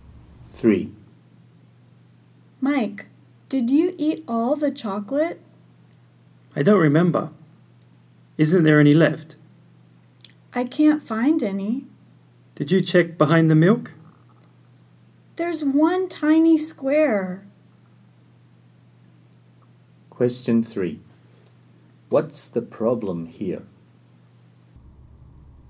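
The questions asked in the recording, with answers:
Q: What's the problem here?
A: Almost all the chocolate has been eaten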